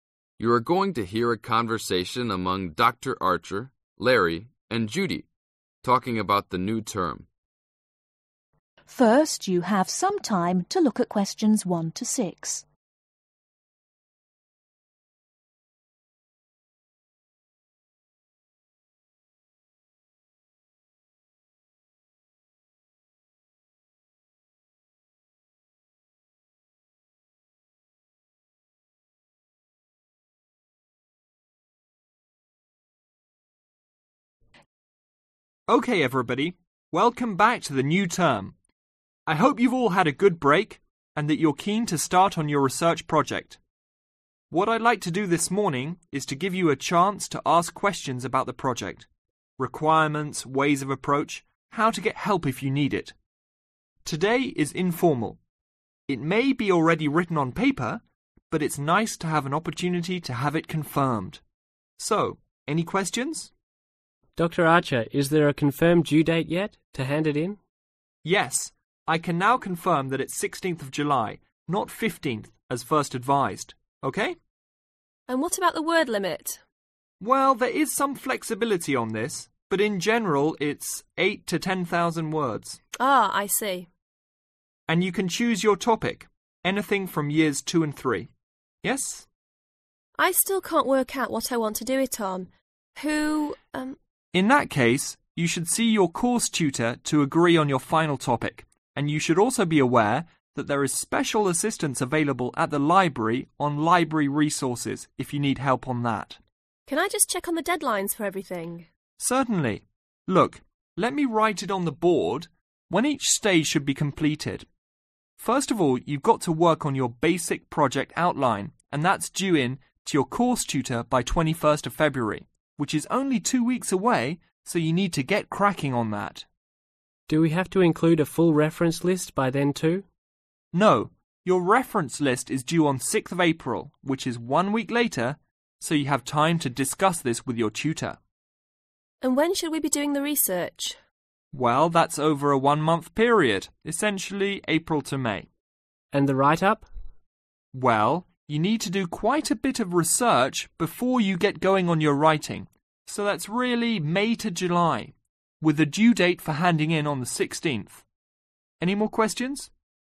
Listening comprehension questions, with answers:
Complete the notes below. Write NO MORE THAN TWO WORDS OR/AND A NUMBER for each answer.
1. Due date : (1)............ or acceptable alternatives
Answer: 16 July

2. Length : (2)............ to 10,000 words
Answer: 8,000

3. Extra assistance offered on : (3)............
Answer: Library Resources